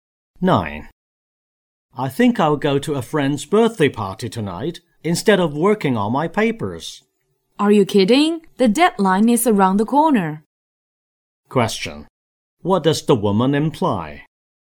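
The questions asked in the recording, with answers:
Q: What does the woman imply?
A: The man should work on his papers instead of going to the party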